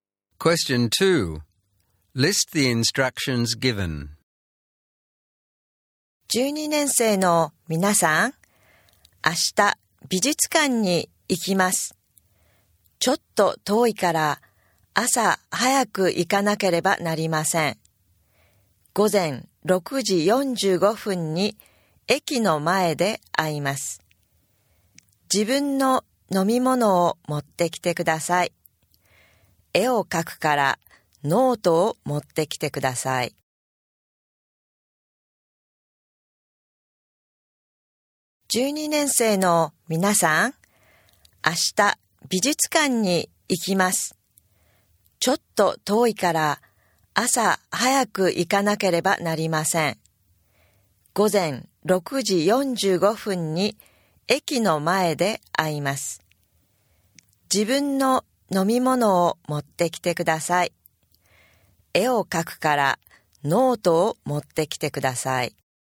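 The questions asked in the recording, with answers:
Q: List the instructions given.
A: Meet in front of the station at 6:45 am, bring your own drink, and bring a notebook for drawing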